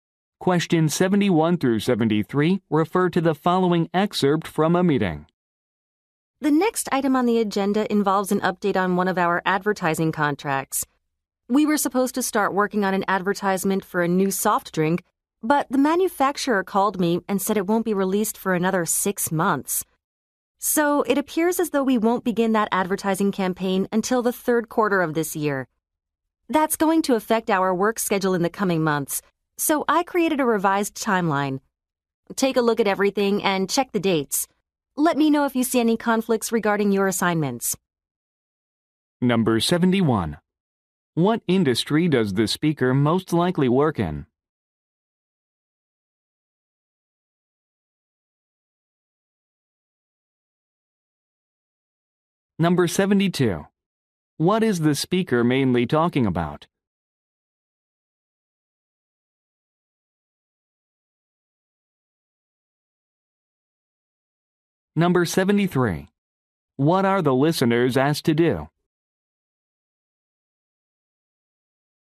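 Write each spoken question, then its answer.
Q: What industry does the speaker most likely work in?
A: Advertising

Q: What is the speaker mainly talking about?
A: A delayed advertising campaign and a revised schedule

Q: What are the listeners asked to do?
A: Check the dates on the revised timeline for conflicts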